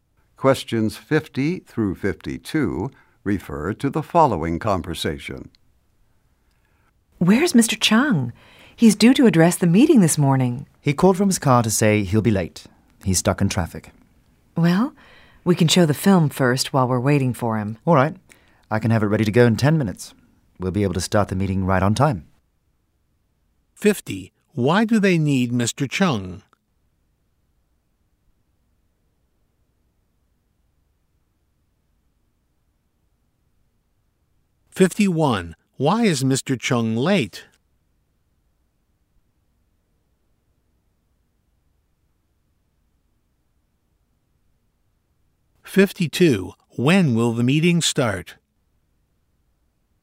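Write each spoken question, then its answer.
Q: Why do they need Mr. Chung?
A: He is to address the meeting

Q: Why is Mr. Chung late?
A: He's stuck in traffic

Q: When will the meeting start?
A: Right on time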